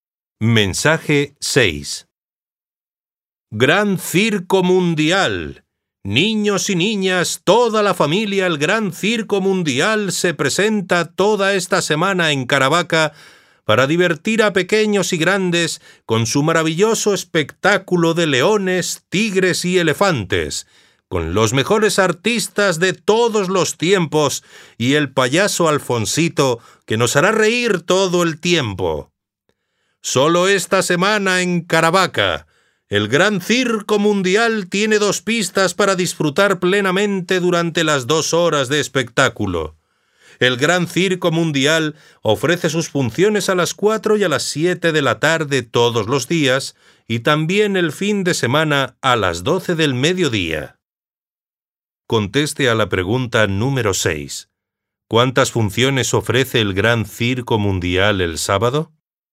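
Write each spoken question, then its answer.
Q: ¿Cuántas funciones ofrece el Gran Circo Mundial el sábado?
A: Tres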